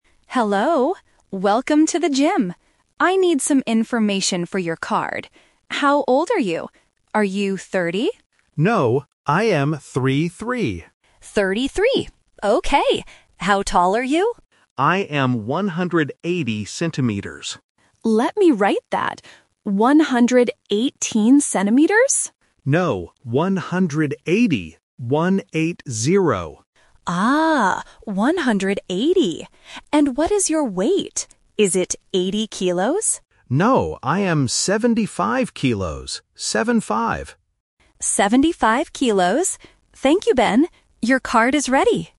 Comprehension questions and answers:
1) How old is Ben?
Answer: 33

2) How tall is Ben?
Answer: 180 cm

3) What is Ben's weight?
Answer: 75 kilos